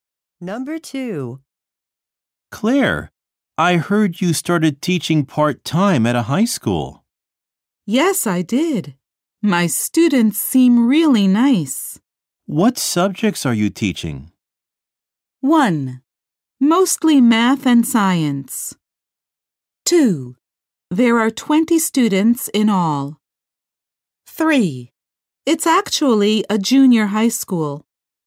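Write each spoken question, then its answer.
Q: What subjects are you teaching?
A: 1: Mostly math and science.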